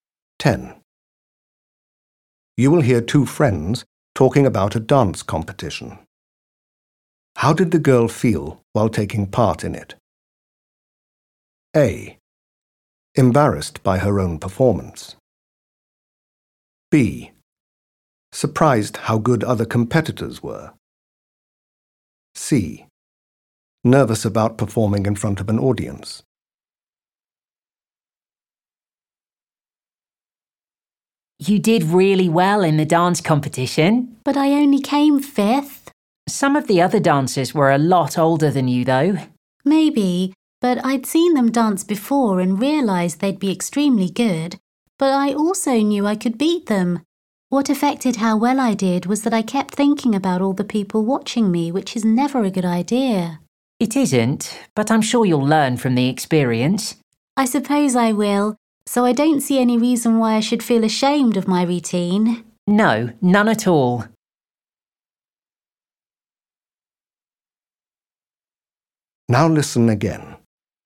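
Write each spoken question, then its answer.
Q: How did the girl feel while taking part in it?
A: C: Nervous about performing in front of an audience.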